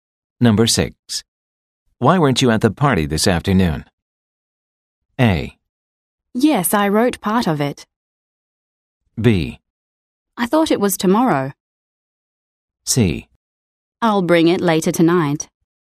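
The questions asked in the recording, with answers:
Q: Why weren't you at the party this afternoon?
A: B: I thought it was tomorrow.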